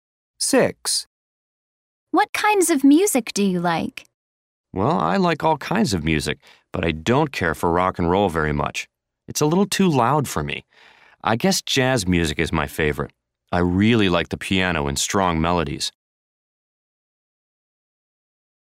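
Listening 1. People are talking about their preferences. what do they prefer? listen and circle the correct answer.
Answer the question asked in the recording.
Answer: jazz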